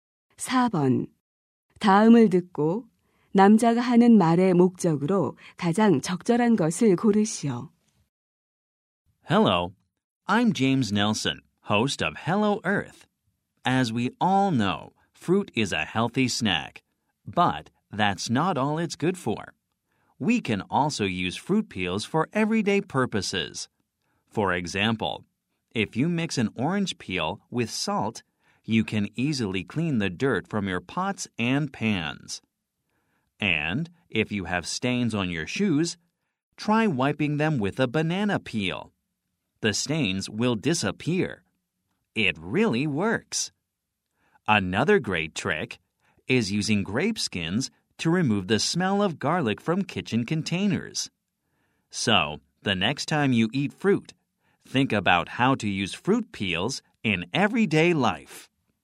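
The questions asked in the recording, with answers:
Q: 다음을 듣고 남자가 하는 말의 목적으로 가장 적절한 것을 고르시오.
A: 과일 껍질을 일상생활에 활용하는 방법을 소개하려고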